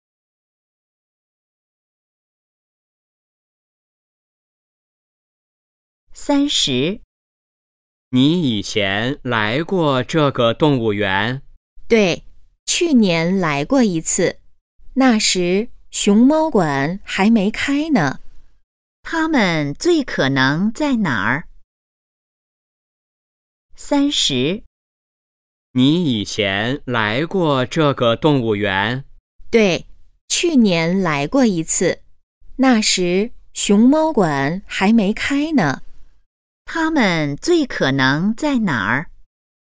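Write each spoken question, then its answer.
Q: 他们最可能在哪儿?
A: 动物园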